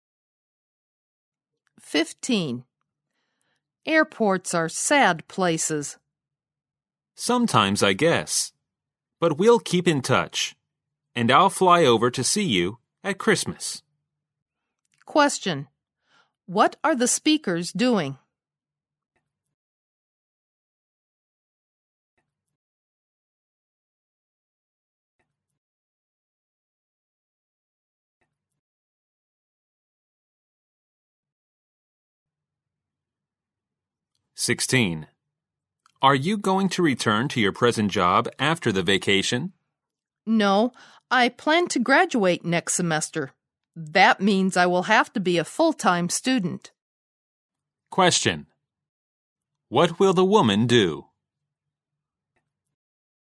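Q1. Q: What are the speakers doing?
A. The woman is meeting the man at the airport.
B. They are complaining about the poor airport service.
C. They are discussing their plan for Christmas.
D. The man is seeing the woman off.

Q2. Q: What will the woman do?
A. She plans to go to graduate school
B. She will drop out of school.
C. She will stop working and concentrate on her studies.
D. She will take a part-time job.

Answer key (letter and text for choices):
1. D. The man is seeing the woman off.
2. C. She will stop working and concentrate on her studies.

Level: 大学英语四级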